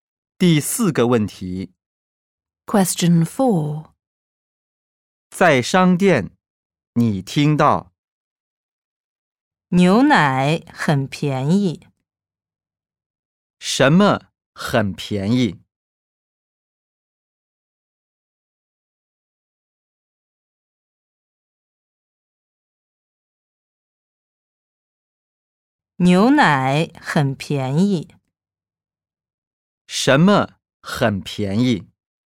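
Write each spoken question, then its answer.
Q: 什么很便宜?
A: 牛奶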